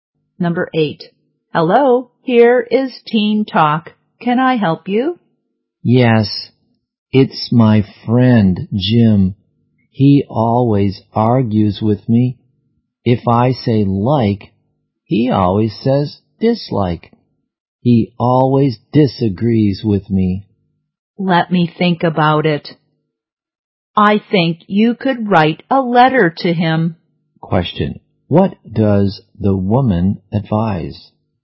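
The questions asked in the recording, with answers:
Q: What does the woman advise?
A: Write a letter to Jim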